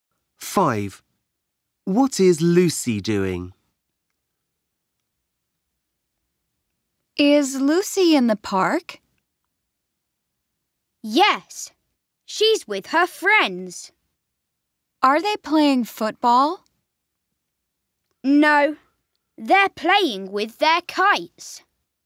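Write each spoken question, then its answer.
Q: What is Lucy doing?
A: Playing with kites in the park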